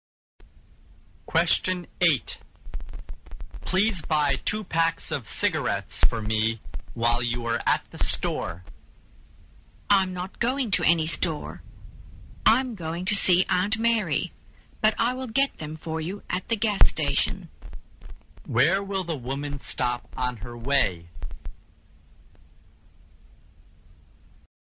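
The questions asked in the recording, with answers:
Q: Where will the woman stop on her way?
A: At the gas station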